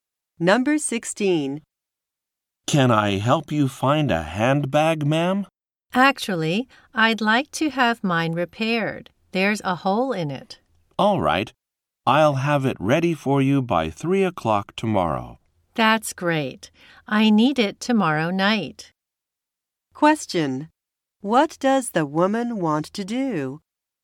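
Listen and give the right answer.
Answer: Have her handbag repaired.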